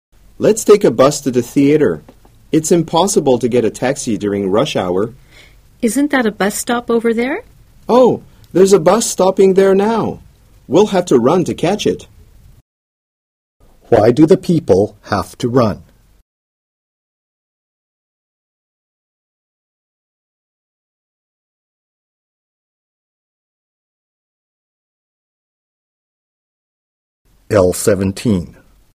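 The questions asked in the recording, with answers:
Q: Why do the people have to run?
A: To catch the bus that is stopping now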